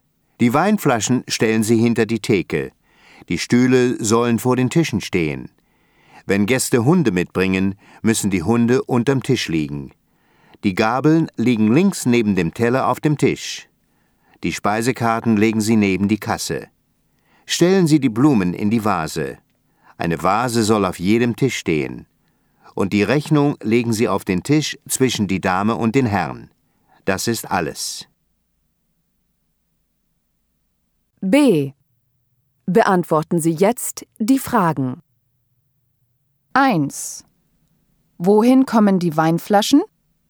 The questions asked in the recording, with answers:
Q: Wohin kommen die Weinflaschen?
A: Hinter die Theke.